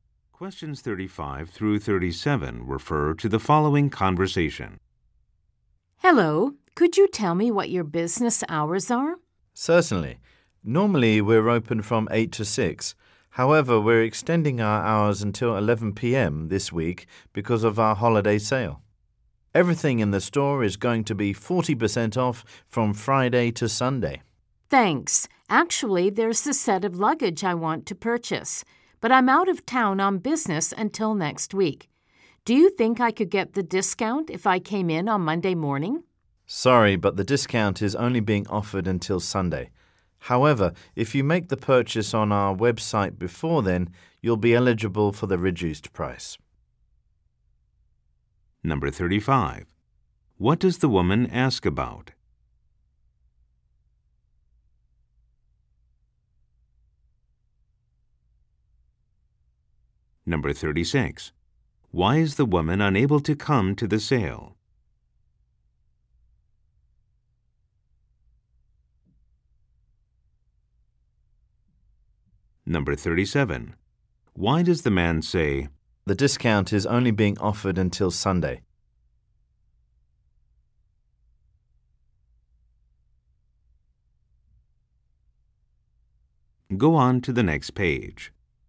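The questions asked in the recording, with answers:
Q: What does the woman ask about?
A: The store's business hours

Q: Why is the woman unable to come to the sale?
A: She is out of town on business until next week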